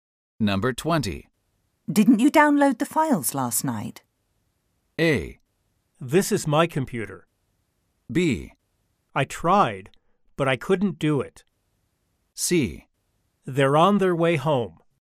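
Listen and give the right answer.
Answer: B: I tried, but I couldn't do it.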